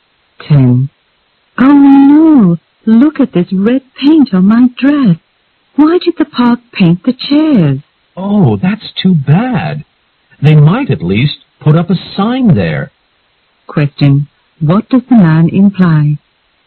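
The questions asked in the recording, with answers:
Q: What does the man imply?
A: The park should have put up a sign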